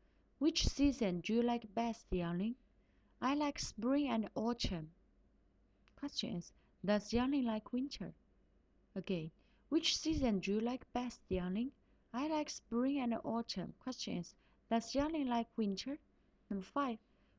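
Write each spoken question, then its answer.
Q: does Yangling like winter?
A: No, she doesn't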